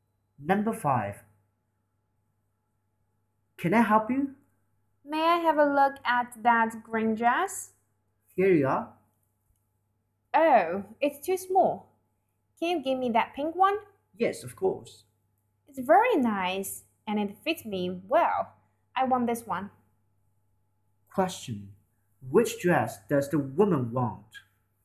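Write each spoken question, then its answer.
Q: Which dress does the woman want?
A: The pink one.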